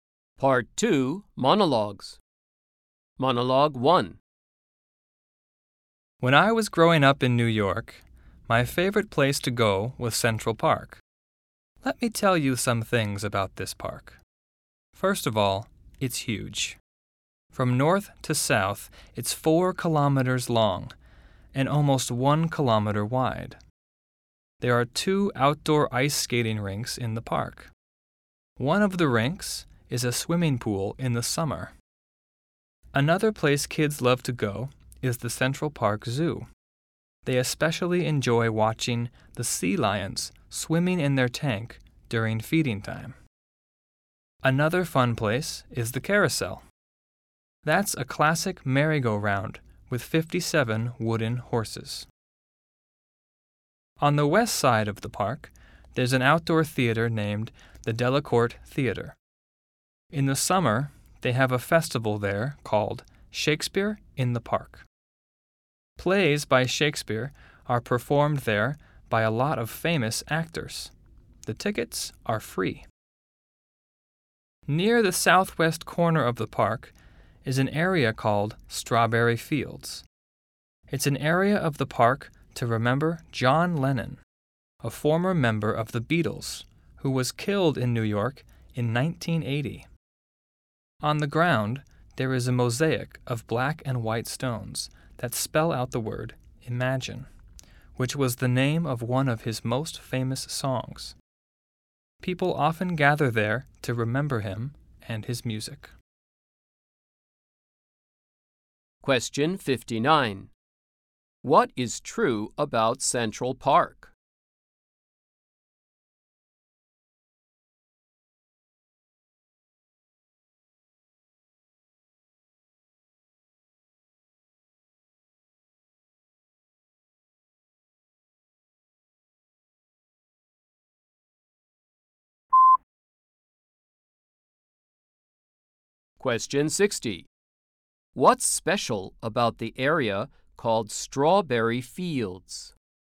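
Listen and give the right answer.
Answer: It remembers John Lennon, with an "Imagine" mosaic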